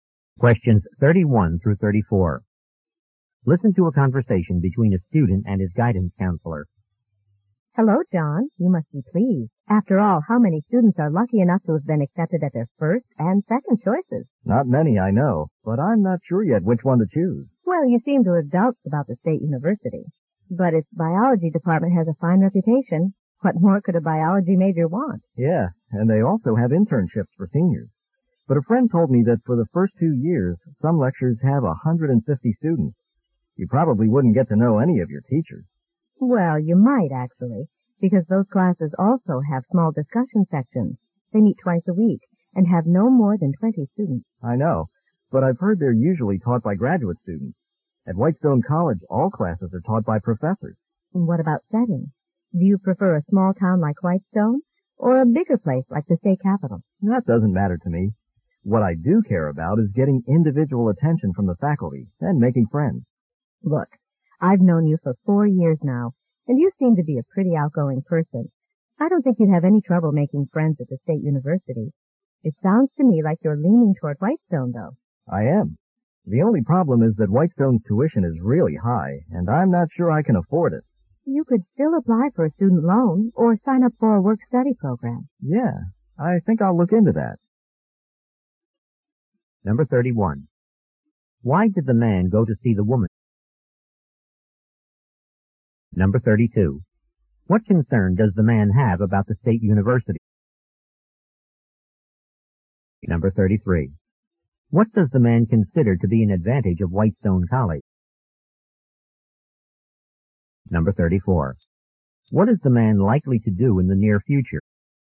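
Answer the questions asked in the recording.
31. To get help choosing between two schools.
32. Large classes with little contact with teachers.
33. All classes are taught by professors.
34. Look into a student loan or a work-study program.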